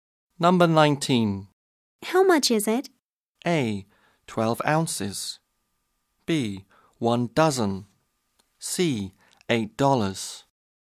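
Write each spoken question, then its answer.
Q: How much is it?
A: C: $8.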